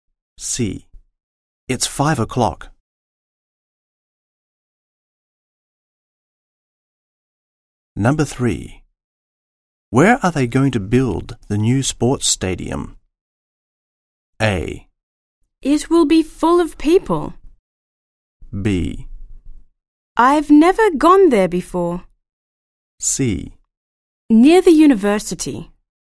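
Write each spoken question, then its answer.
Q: Where are they going to build the new sports stadium?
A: C: Near the university.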